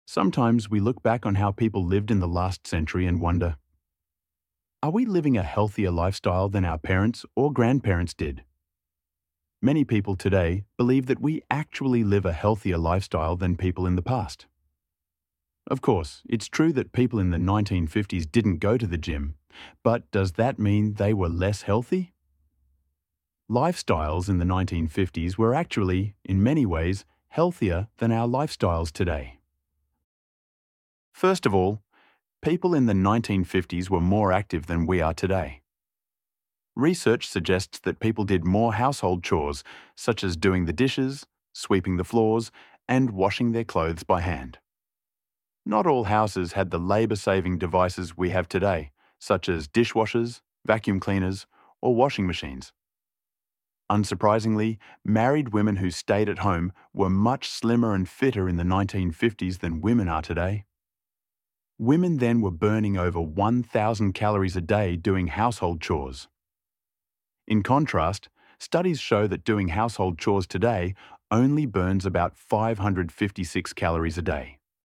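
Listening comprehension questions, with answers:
Listen and decide if the statement is True or False.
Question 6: People in the 1950s were more active than people today because they did more household chores.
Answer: True

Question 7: Modern appliances like dishwashers and washing machines help people burn more calories.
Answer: False

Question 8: Married women in the 1950s burned over 1,000 calories daily by doing household chores.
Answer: True

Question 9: Today, household chores burn about 556 calories per day.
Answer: True

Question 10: Going to the gym was a common activity in the 1950s.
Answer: False

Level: 9-10 კლასი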